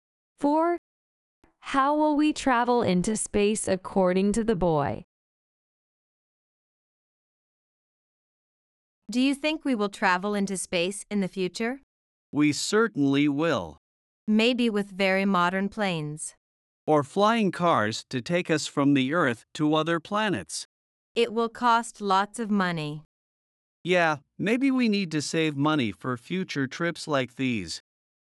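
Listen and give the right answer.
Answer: With very modern planes or flying cars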